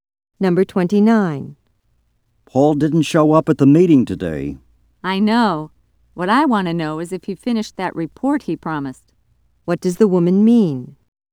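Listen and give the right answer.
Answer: She wonders whether Paul finished the report he promised.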